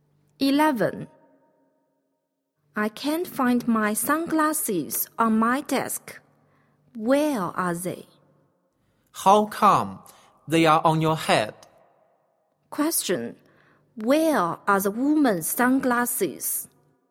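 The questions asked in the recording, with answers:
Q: Where are the woman's sunglasses?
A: On her head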